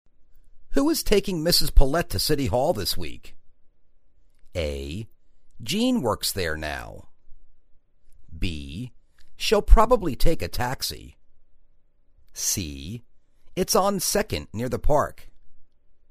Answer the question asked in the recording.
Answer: She'll probably take a taxi.